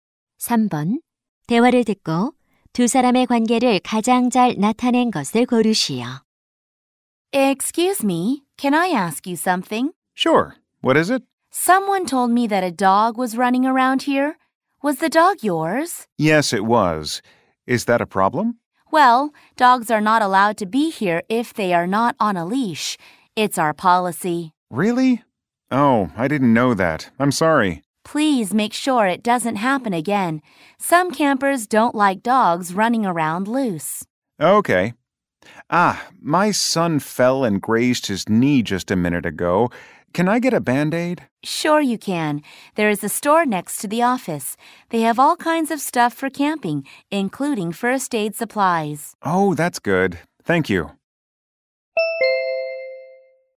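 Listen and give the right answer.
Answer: 캠핑장 관리인 - 캠핑객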